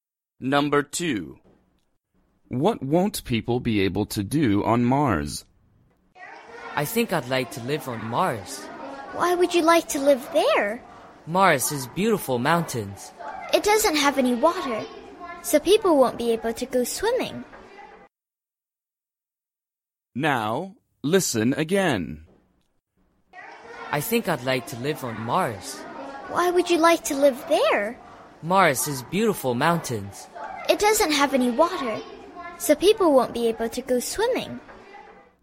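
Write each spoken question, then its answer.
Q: What won't people be able to do on Mars?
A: go swimming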